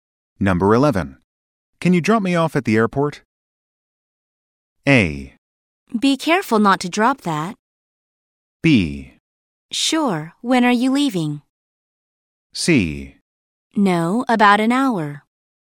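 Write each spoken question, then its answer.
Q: Can you drop me off at the airport?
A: B: Sure, when are you leaving?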